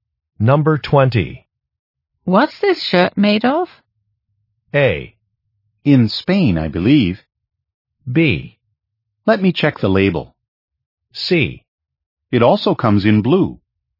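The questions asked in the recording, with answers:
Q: What's this shirt made of?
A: B: Let me check the label.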